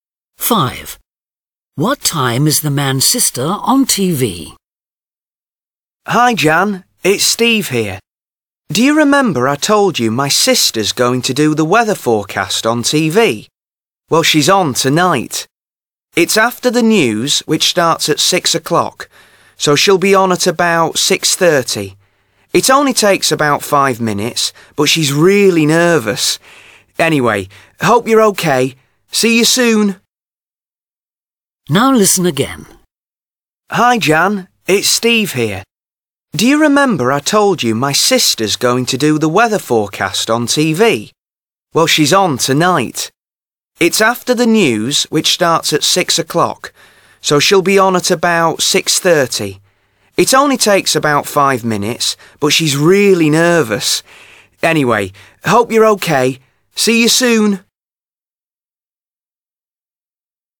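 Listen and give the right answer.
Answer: at about 6:30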